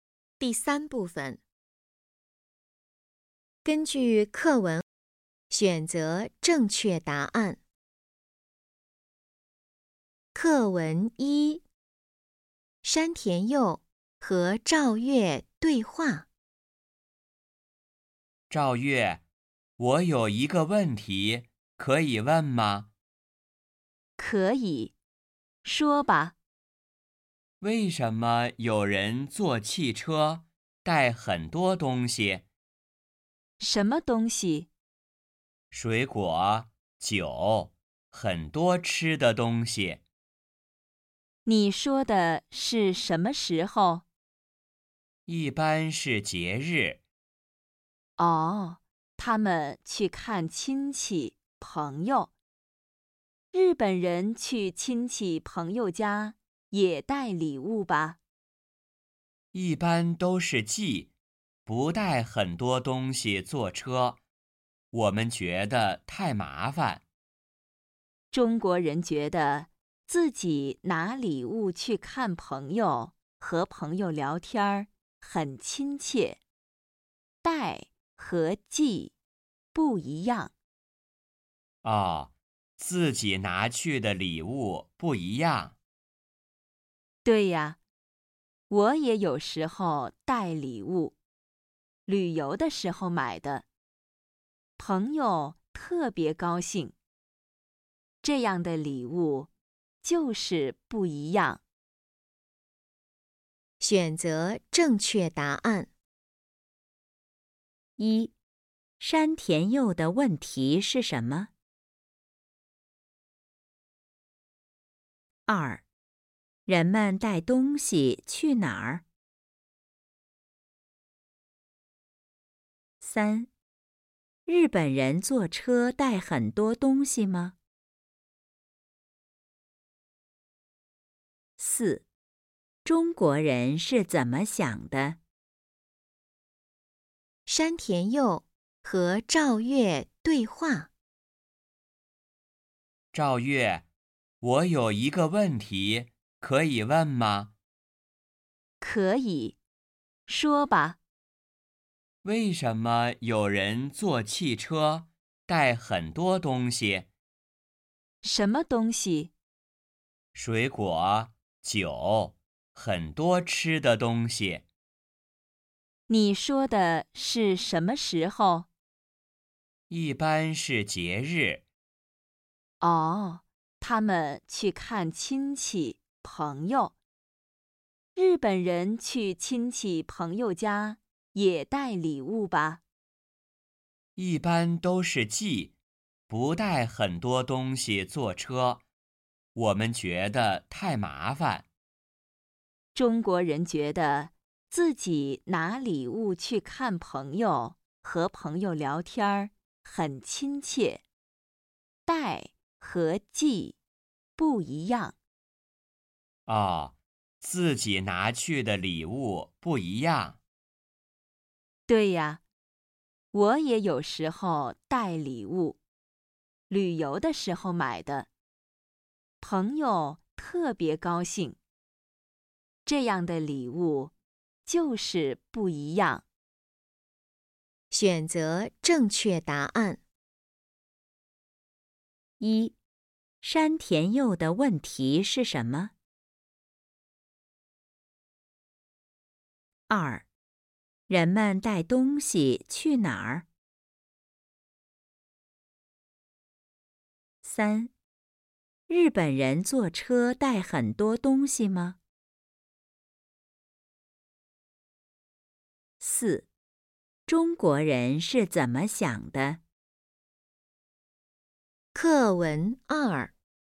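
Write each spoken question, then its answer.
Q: 山田佑的问题是什么?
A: 为什么有人坐汽车带很多东西

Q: 人们带东西去哪儿?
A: 去看亲戚朋友

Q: 日本人坐车带很多东西吗?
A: 不带,一般都是寄

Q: 中国人是怎么想的?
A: 自己拿礼物去看朋友很亲切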